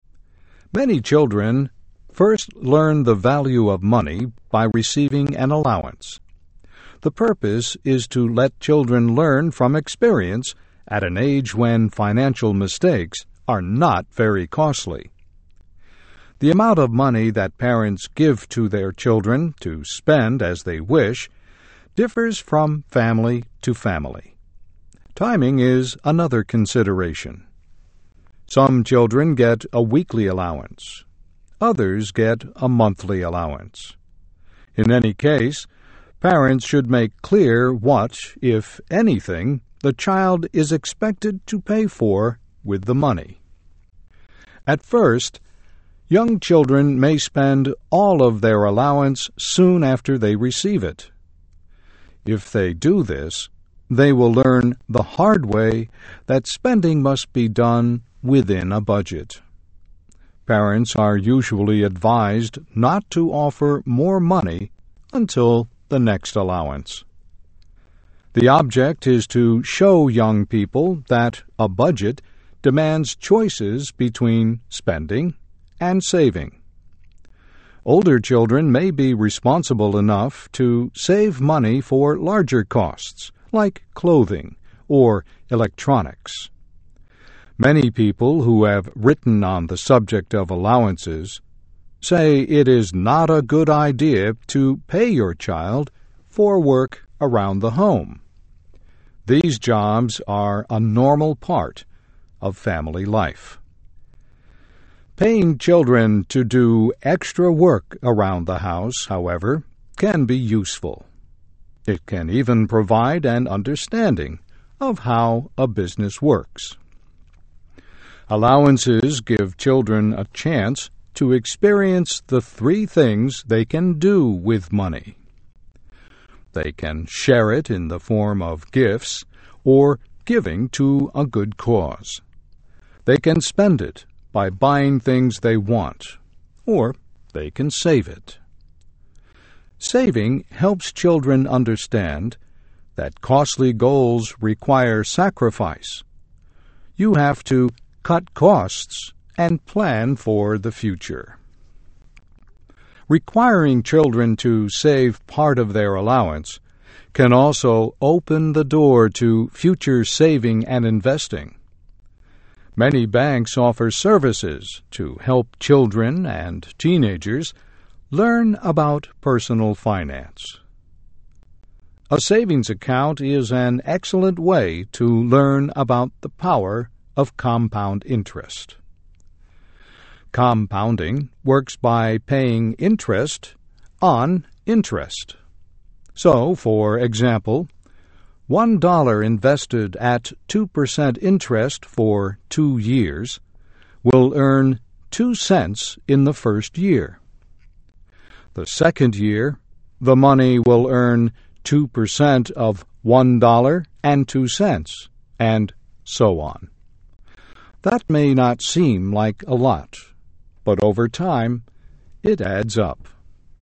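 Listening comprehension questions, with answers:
Click on the sentence to listen and answer the questions.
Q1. A budget demands choices between which two things?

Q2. Why is it not a good idea to pay children for work they do at home?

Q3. What is a very good way for children to learn about compound interest?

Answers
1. Spending and saving.
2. Because these jobs are a normal part of family life.
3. A savings account.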